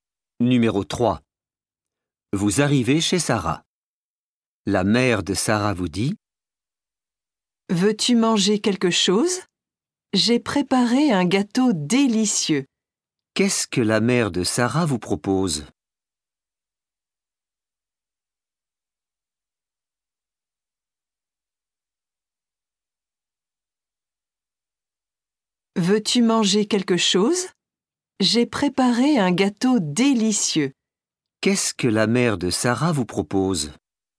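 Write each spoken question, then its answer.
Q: Qu'est-ce que la mère de Sarah vous propose?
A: Un gâteau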